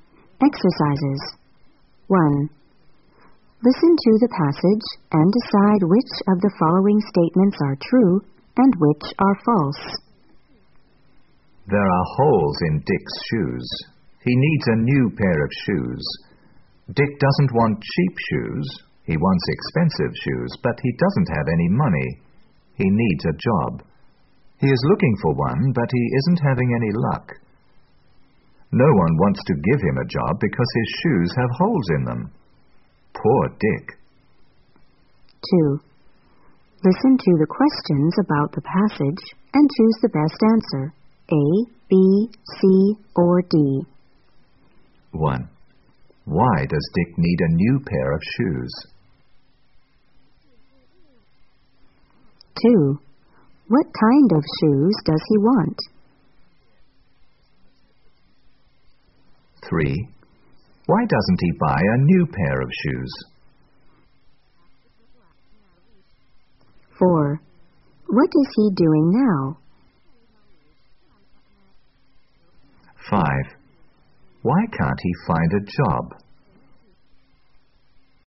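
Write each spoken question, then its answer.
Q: Why does Dick need a new pair of shoes?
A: Because there are holes in his shoes.

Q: What kind of shoes does he want?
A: Expensive shoes.

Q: Why doesn't he buy a new pair of shoes?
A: He doesn't have any money.

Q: What is he doing now?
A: Looking for a job.

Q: Why can't he find a job?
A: Because his shoes have holes in them.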